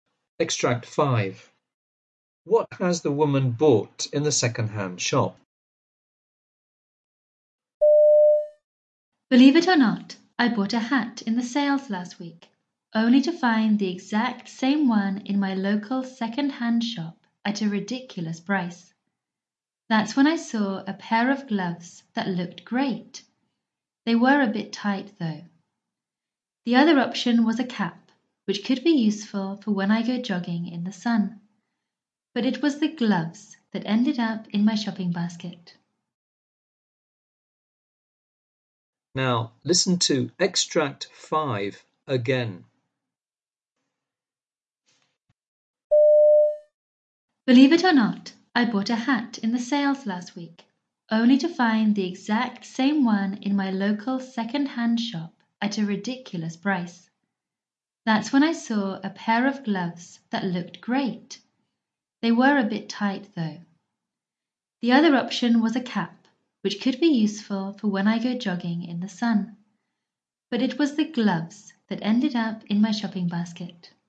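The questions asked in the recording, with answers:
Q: What has the woman bought in the second-hand shop?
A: A pair of gloves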